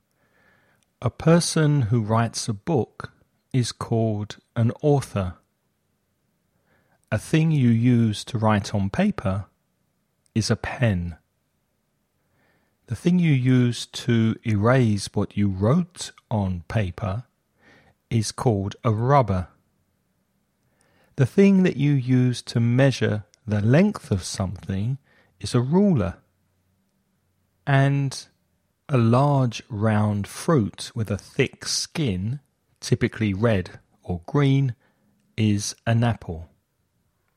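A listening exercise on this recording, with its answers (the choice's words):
Elige la mejor respuesta para cada pregunta.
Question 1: What do you call a person who writes a book?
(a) reader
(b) author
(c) artist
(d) teacher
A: author

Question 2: What do you call the thing that you use to write on paper?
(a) pen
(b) board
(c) rubber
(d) ruler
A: pen

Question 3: What do you call the thing that you use to erase what you wrote on paper?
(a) pen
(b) pencil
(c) rubber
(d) ruler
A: rubber

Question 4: What do you call the thing that you use to measure the length of something?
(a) pen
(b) pencil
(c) sharpener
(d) ruler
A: ruler

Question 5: Which of the following words means "a large, round fruit with a thin skin, typically red or green"?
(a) banana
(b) orange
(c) peach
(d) apple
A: apple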